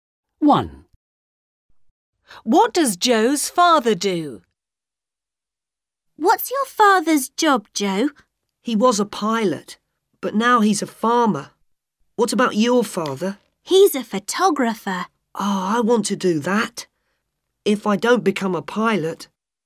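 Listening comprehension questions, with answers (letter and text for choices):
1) What does Joe's father do?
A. a farmer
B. a photographer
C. a pilot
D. a teacher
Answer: A. a farmer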